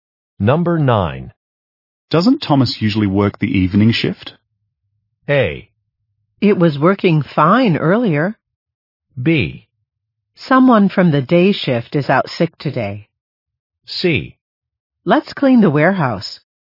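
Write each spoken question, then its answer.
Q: Doesn't Thomas usually work the evening shift?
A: B: Someone from the day shift is out sick today.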